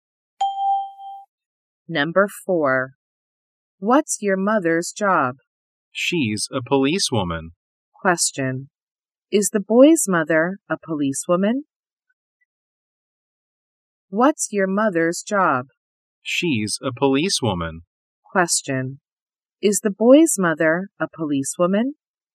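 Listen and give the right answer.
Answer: Yes, she is.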